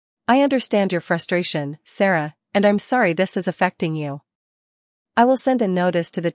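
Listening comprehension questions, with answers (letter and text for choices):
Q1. What action will the management take?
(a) Nothing, as the issue is not serious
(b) They will send a notice to the noisy tenant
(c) They will ask Sarah to move apartments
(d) They will reduce Sarah's rent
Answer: (b) They will send a notice to the noisy tenant

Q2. What does the management suggest Sarah do if the noise continues?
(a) Ignore it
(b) Call again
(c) Move to another apartment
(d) Report it to the police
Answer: (b) Call again

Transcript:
I understand your frustration, Sarah, and I'm sorry this is affecting you.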